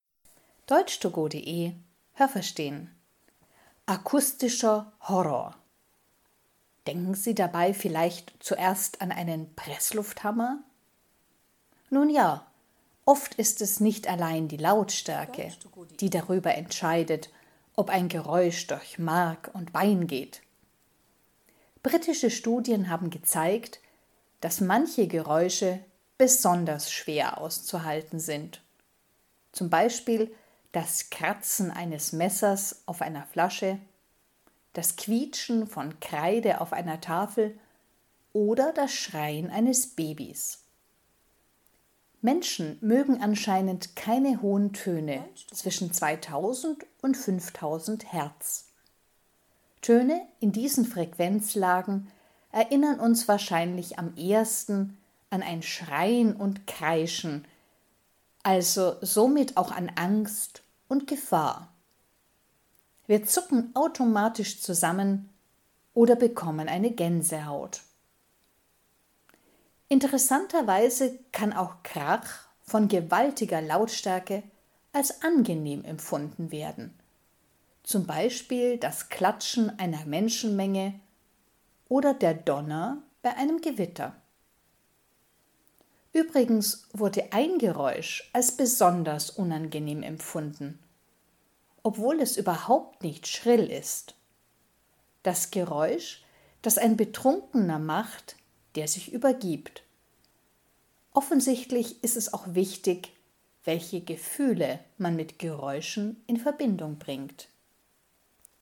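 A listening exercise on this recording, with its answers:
Was haben Sie gehört? Es gibt nur eine korrekte Antwort.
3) Menschen mögen keine hohen Töne zwischen _____ .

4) Menschen mögen so hohe Töne nicht, weil sie bei dieser Frequenz ____ denken .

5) Der Donner bei einem Gewitter ...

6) Besonders unangenehm ist das Geräusch, wenn ...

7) _____ , welche Gefühle man mit einem Geräusch verbindet.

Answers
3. 2000 und 5000 Hertz
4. an Schreien und Kreischen, also an Angst und Gefahr
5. kann trotz gewaltiger Lautstärke als angenehm empfunden werden
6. ein Betrunkener sich übergibt
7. Es ist auch wichtig

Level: B (mittel)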